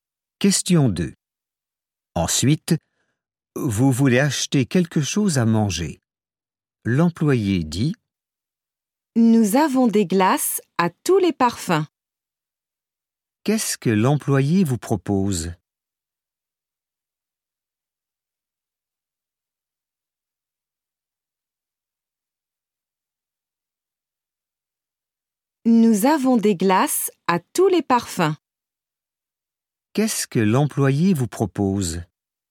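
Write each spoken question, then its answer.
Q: Qu'est-ce que l'employé vous propose ?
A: Des glaces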